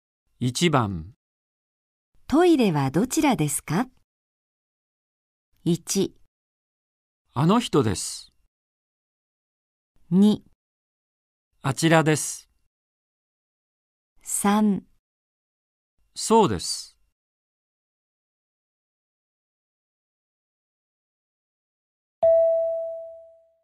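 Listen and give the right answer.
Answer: 2: あちらです。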